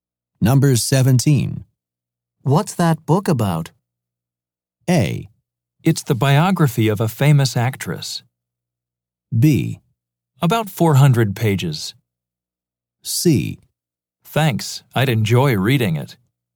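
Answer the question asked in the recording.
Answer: A: It's the biography of a famous actress.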